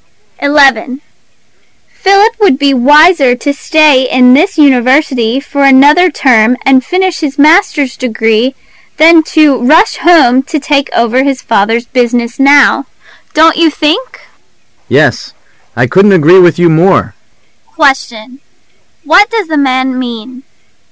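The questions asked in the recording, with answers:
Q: What does the man mean?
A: He agrees that Philip should stay and finish his master's degree.

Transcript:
[解析] W: Philip would be wiser to stay in this university for another term and finish his Master's degree than to rush home to take over his father's business now.Don't you think? M : Yes, I couldn't agree with you more. Q: What does the man mean?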